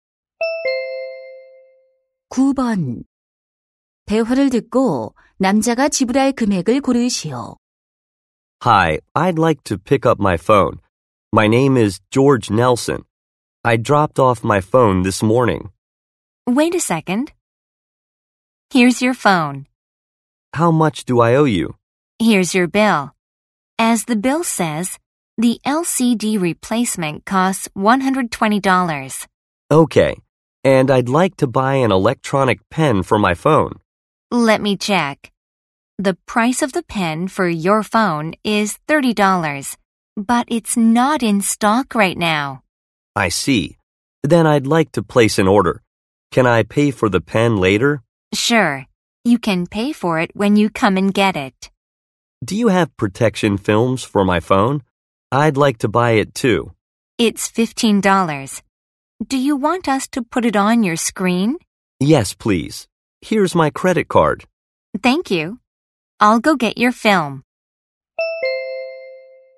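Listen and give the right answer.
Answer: 135달러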